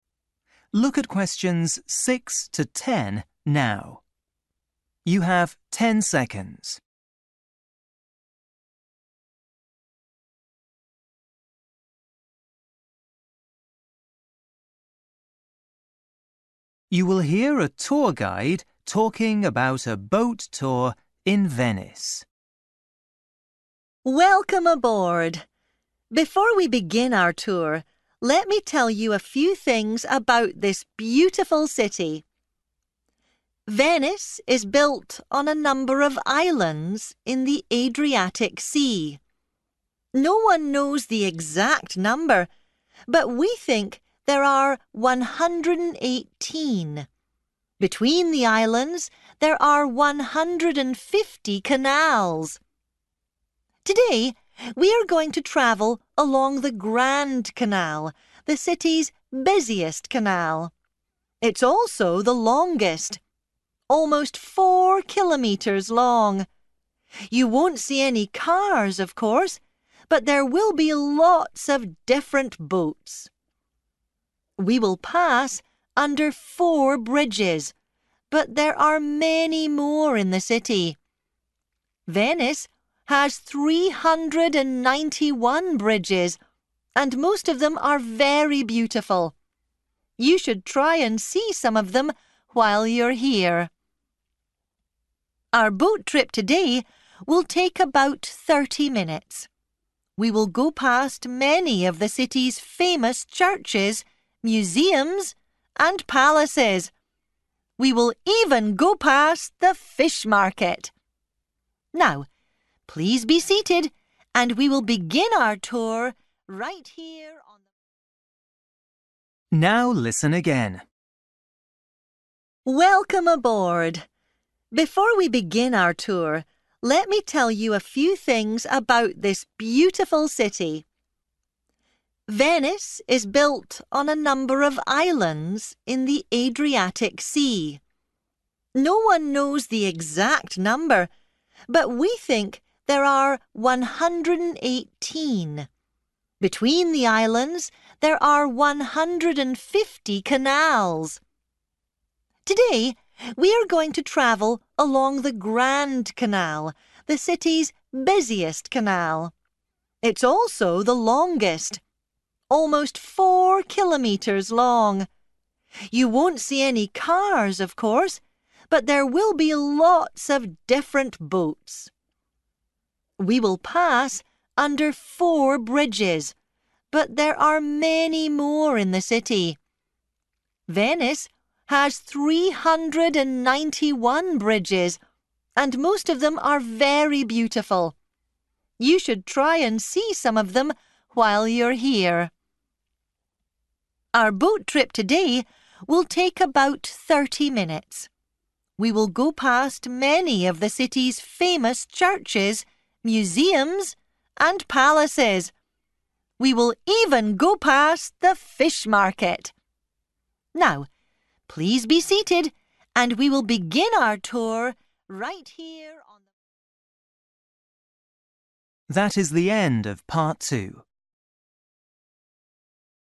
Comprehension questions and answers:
For each question, write the correct answer in the gap. Write one word or a number or a date or a time.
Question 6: Number of islands:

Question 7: Length of the Grand Canal:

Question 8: Number of bridges in Venice:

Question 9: Duration of tour:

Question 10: Buildings along the Grand Canal:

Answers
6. 118
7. 4/four
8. 391
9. 30/thirty
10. fish

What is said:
Woman: Welcome aboard! Before we begin our tour, let me tell you a few things about this beautiful city. Venice is built on a number of islands in the Adriatic Sea. No one knows the exact number, but we think there are 118. Between the islands there are 150 canals.
Today we are going to travel along the Grand Canal, the city's busiest canal. It's also the longest: almost four kilometres long! You won't see any cars, of course, but there will be lots of different boats. We will pass under four bridges, but there are many more in the city. Venice has 391 bridges, and most of them are very beautiful. You should try and see some of them while you are here.
Our boat trip today will take about thirty minutes. We will go past many of the city's famous churches, museums and palaces. We will even go past the fish market!
Now, please be seated and we will begin our tour ... [fade]
Now listen again.

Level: KET (A2)